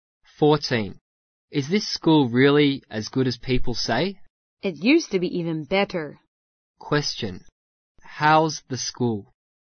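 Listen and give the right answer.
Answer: Good, but not as good as it used to be.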